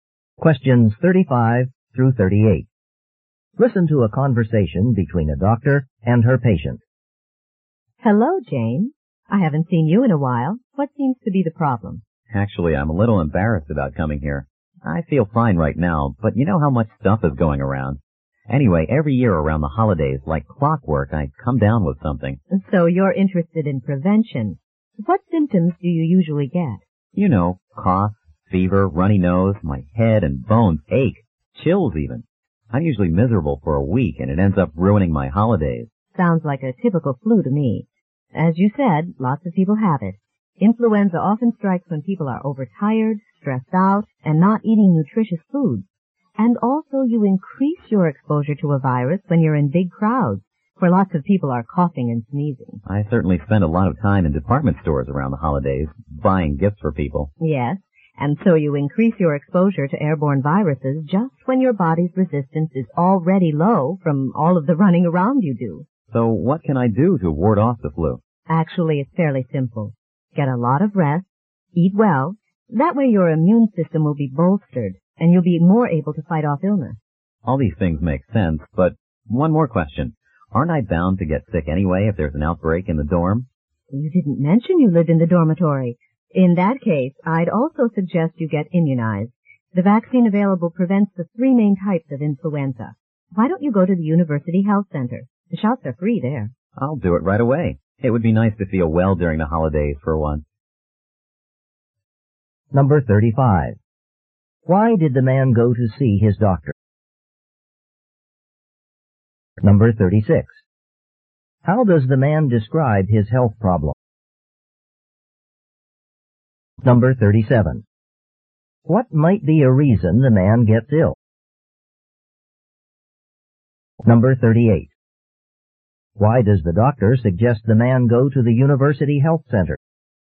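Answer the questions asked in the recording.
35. To find out how to prevent the flu
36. Every year around the holidays he gets cough, fever, runny nose, aches and chills
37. He is overtired and in big crowds in department stores
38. The flu shots are free there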